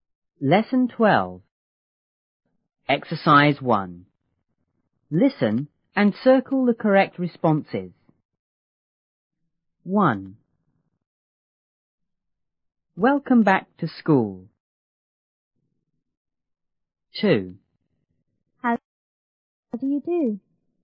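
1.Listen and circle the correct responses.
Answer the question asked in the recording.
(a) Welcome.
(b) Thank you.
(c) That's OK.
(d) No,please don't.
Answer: (b) Thank you.

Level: 初中英语广州版1B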